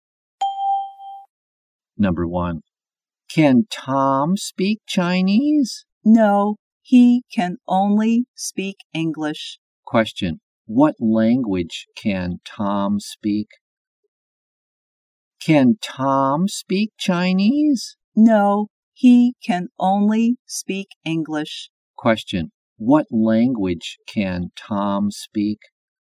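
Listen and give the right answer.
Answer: English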